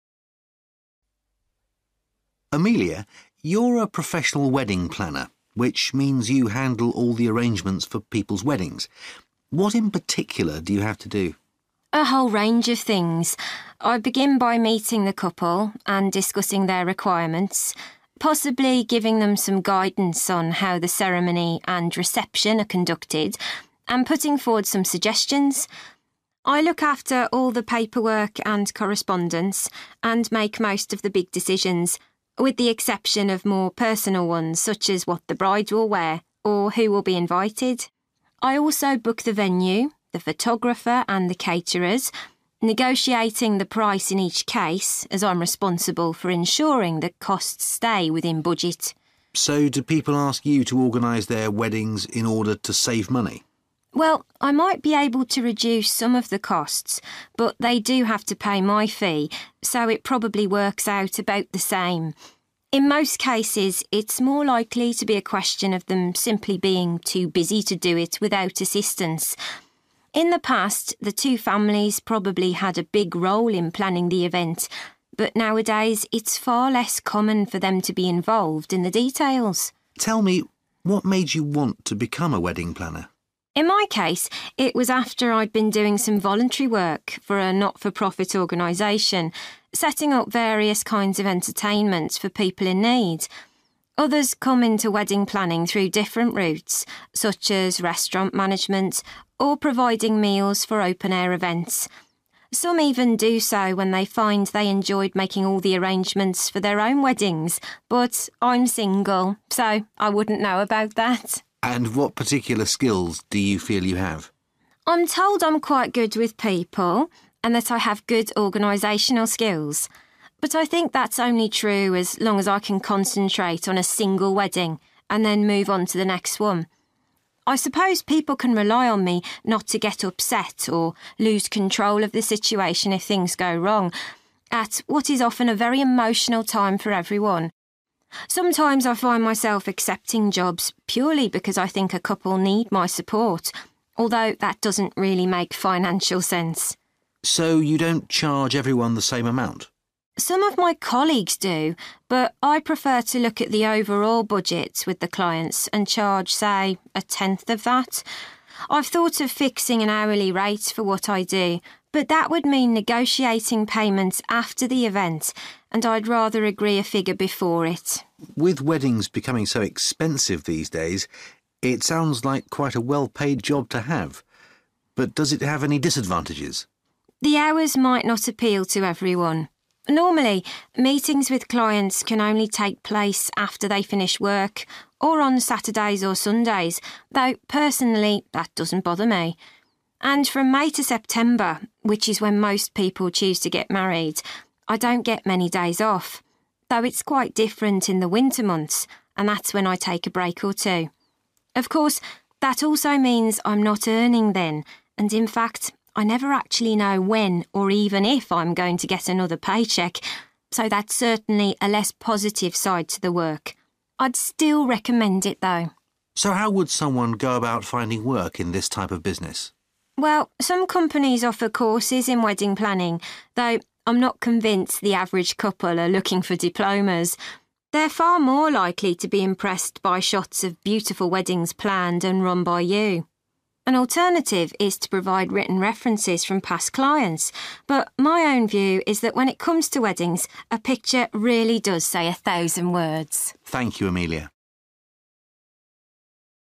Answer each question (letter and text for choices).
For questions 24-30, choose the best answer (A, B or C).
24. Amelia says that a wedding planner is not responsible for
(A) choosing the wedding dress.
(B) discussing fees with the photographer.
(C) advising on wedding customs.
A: (A) choosing the wedding dress.

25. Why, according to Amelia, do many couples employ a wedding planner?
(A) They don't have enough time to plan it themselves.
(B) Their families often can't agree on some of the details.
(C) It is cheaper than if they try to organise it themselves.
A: (A) They don't have enough time to plan it themselves.

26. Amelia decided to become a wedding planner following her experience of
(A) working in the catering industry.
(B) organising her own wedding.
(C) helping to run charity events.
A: (C) helping to run charity events.

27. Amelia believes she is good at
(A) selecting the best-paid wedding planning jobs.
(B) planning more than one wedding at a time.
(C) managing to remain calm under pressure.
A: (C) managing to remain calm under pressure.

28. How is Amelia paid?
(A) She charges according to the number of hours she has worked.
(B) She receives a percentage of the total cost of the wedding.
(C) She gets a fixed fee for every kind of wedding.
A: (B) She receives a percentage of the total cost of the wedding.

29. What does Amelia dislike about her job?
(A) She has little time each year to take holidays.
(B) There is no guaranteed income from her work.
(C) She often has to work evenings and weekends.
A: (B) There is no guaranteed income from her work.

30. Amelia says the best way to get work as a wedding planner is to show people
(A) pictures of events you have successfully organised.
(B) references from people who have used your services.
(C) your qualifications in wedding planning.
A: (A) pictures of events you have successfully organised.

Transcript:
Man: Amelia, you're a professional wedding planner, which means you handle all the arrangements for people's weddings. What in particular do you have to do?
Amelia: A whole range of things. I begin by meeting the couple and discussing their requirements, possibly giving them some guidance on how the ceremony and reception are conducted and putting forward some suggestions. I look after all the paperwork and correspondence and make most of the big decisions, with the exception of more personal ones such as what the bride will wear, or who will be invited. I also book the venue, the photographer and the caterers, negotiating the price in each case as I'm responsible for ensuring that costs stay within budget.
Man: So do people ask you to organise their weddings in order to save money?
Amelia: Well, I might be able to reduce some of the costs, but they do have to pay my fee so it probably works out about the same. In most cases it's more likely to be a question of them simply being too busy to do it without assistance. In the past the two families probably had a big role in planning the event, but nowadays it's far less common for them to be involved in the details.
Man: Tell me, what made you want to become a wedding planner?
Amelia: In my case it was after I'd been doing some voluntary work for a not-for-profit organisation, setting up various kinds of entertainment for people in need. Others come into wedding planning through different routes, such as restaurant management or providing meals for open-air events. Some even do so when they find they enjoyed making all the arrangements for their own weddings, but I'm single so I wouldn't know about that!
Man: And what particular skills do you feel you have?
Amelia: I'm told I'm quite good with people, and that I have good organisational skills. But I think that's only true as long as I can concentrate on a single wedding and then move onto the next one. I suppose people can rely on me not to get upset or lose control of the situation if things go wrong, at what is often a very emotional time for everyone. Sometimes I find myself accepting jobs purely because I think a couple need my support, although that doesn't really make financial sense.
Man: So you don't charge everyone the same amount?
Amelia: Some of my colleagues do, but I prefer to look at the overall budget with the clients and charge, say, a tenth of that. I've thought of fixing an hourly rate for what I do, but that would mean negotiating payment after the event, and I'd rather agree a figure before it.
Man: With weddings becoming so expensive these days, it sounds like quite a well-paid job to have. But does it have any disadvantages?
Amelia: The hours might not appeal to everyone. Normally, meetings with clients can only take place after they finish work or on Saturdays or Sundays, though personally that doesn't bother me. And from May to September, which is when most people choose to get married, I don't get many days off, though it's quite different in the winter months and that's when I take a break or two. Of course, that also means I'm not earning then, and in fact I never actually know when or even if I'm going to get another pay cheque, so that's certainly a less positive side to the work. I'd still recommend it, though.
Man: So how would someone go about finding work in this type of business?
Amelia: Well, some companies offer courses in wedding planning, though I'm not convinced the average couple are looking for diplomas. They're far more likely to be impressed by shots of beautiful weddings planned and run by you. An alternative is to provide written references from past clients, but my own view is that when it comes to weddings, a picture really does say a thousand words.
Man: Thank you, Amelia.